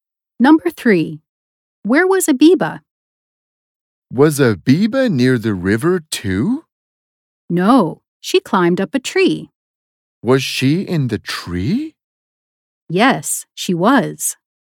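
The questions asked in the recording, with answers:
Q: Where was Abiba?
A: in a tree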